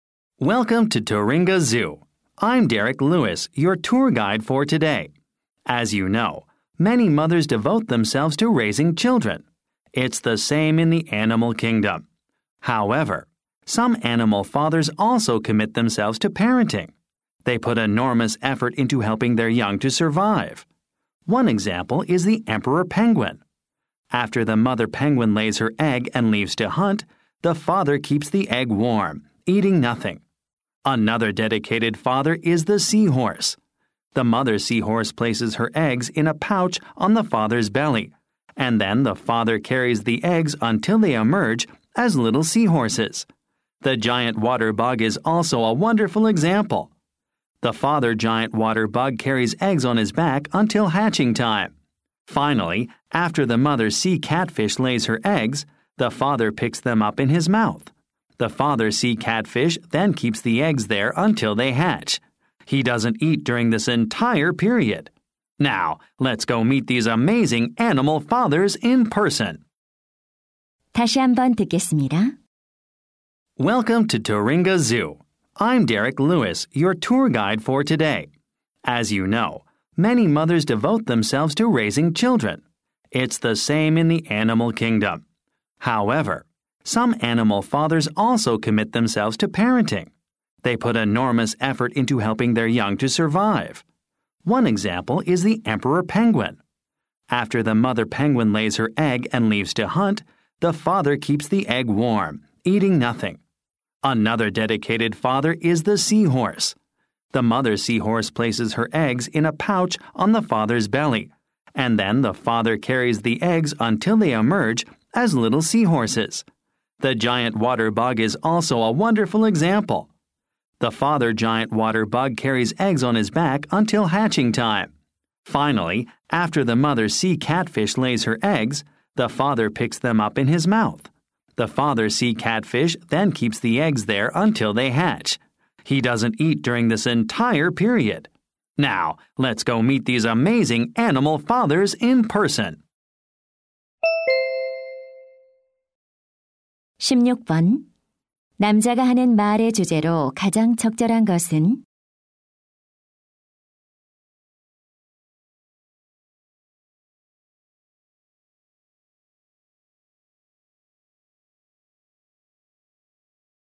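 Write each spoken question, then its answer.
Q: 남자가 하는 말의 주제로 가장 적절한 것은?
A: 새끼 양육에 헌신하는 동물 아빠들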